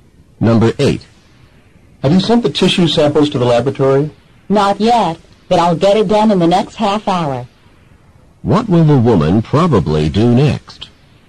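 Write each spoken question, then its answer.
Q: What will the woman probably do next?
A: Send the tissue samples to the laboratory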